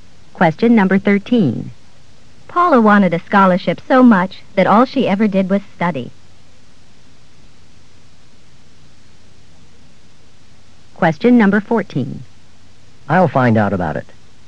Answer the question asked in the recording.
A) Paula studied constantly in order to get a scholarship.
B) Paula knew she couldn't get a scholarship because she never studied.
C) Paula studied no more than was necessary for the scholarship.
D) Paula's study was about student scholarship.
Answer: A) Paula studied constantly in order to get a scholarship.

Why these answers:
Paula wanted a scholarship so much that all she ever did was study.

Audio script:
13. Paula wanted a scholarship so much that all she ever did was
study.